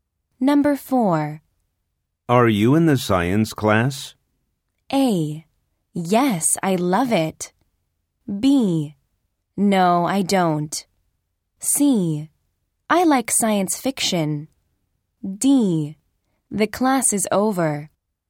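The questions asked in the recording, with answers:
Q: Are you in the science class?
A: A: Yes, I love it.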